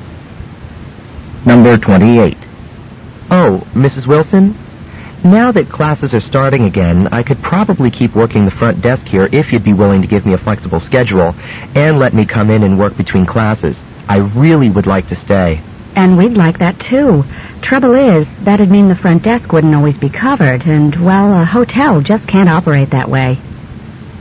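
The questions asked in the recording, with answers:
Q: What does the woman mean?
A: She can't give him a flexible schedule because the desk must always be covered.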